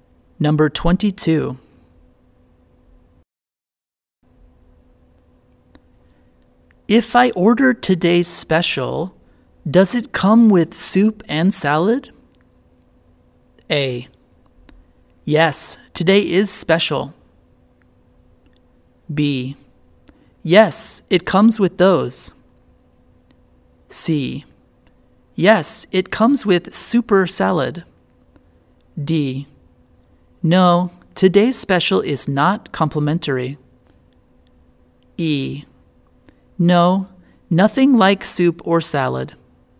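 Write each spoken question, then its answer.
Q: If I order today's special, does it come with soup and salad?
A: B: Yes, it comes with those.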